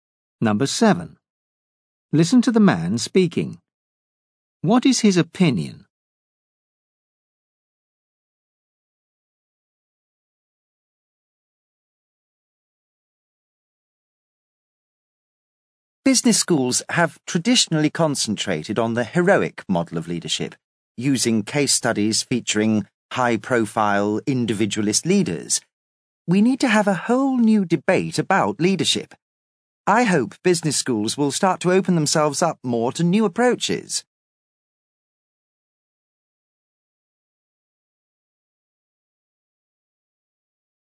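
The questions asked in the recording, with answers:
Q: What is his opinion?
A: Business schools need new approaches to teaching leadership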